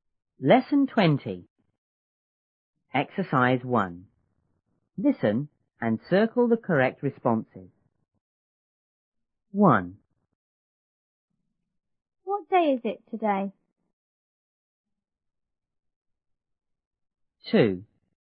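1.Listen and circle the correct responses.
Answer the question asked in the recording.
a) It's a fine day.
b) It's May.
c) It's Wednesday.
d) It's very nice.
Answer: c) It's Wednesday.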